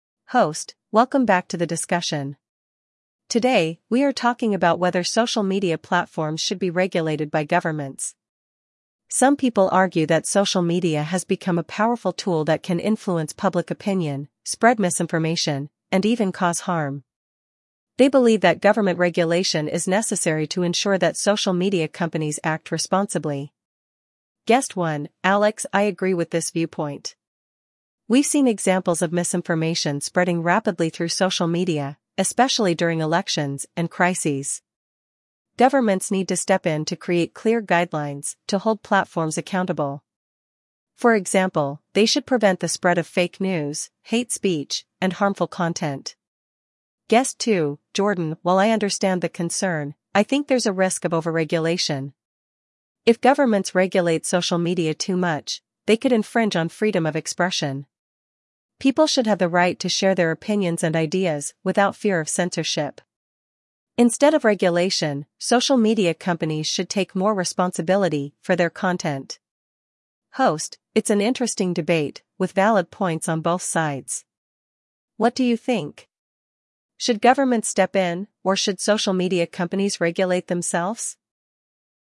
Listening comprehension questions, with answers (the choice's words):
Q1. What is the main topic of discussion?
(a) The importance of social media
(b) The freedom of expression on social media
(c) Whether social media should be regulated by governments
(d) The role of government in media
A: Whether social media should be regulated by governments

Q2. What does Alex think about social media regulation?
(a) He believes there should be no regulation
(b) He thinks governments should regulate social media to prevent harm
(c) He believes social media companies should regulate themselves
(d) He supports complete freedom of expression on social media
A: He thinks governments should regulate social media to prevent harm

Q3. What does Jordan argue against?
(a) Social media companies regulating content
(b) Governments having too much control over social media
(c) The spread of misinformation on social media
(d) The government's role in other forms of media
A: Governments having too much control over social media

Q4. What is Alex's concern regarding social media?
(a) Freedom of speech should be unrestricted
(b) Social media spreads fake news and harmful content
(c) Social media is not popular enough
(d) There are too many social media platforms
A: Social media spreads fake news and harmful content

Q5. According to Jordan, what should social media companies do?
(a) Stop censoring content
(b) Take more responsibility for their content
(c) Increase government regulations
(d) Limit the number of platforms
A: Take more responsibility for their content

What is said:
Host: Welcome back to the discussion. Today, we are talking about whether social media platforms should be regulated by governments. Some people argue that social media has become a powerful tool that can influence public opinion, spread misinformation, and even cause harm. They believe that government regulation is necessary to ensure that social media companies act responsibly.
Guest 1 (Alex): I agree with this viewpoint. We've seen examples of misinformation spreading rapidly through social media, especially during elections and crises. Governments need to step in to create clear guidelines to hold platforms accountable. For example, they should prevent the spread of fake news, hate speech, and harmful content.
Guest 2 (Jordan): While I understand the concern, I think there's a risk of overregulation. If governments regulate social media too much, they could infringe on freedom of expression. People should have the right to share their opinions and ideas without fear of censorship. Instead of regulation, social media companies should take more responsibility for their content.
Host: It's an interesting debate, with valid points on both sides. What do you think? Should governments step in, or should social media companies regulate themselves?